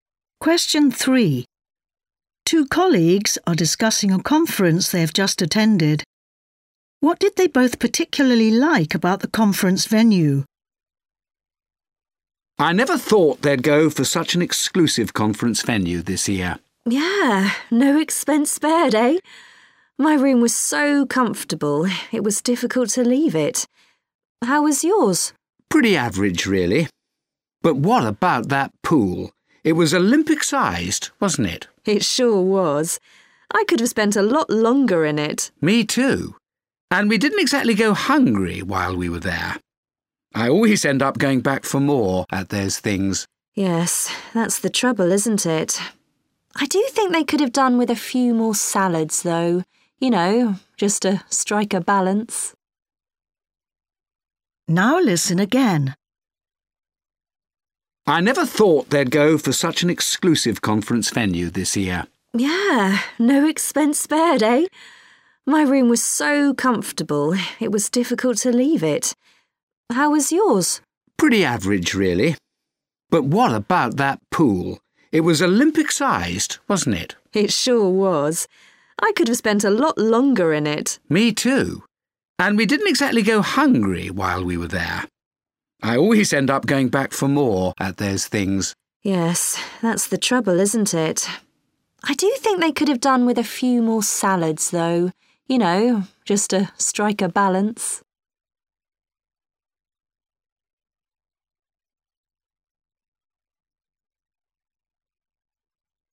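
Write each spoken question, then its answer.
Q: What did they both particularly like about the conference venue?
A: The swimming pool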